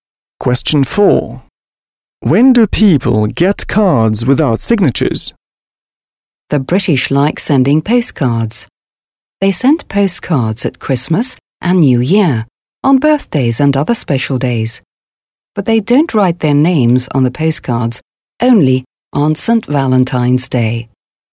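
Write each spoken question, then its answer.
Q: When do people get cards without signatures?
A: On St. Valentine's Day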